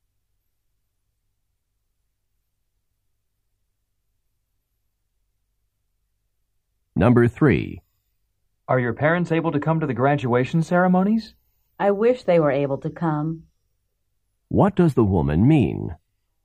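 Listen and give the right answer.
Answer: Her parents cannot come.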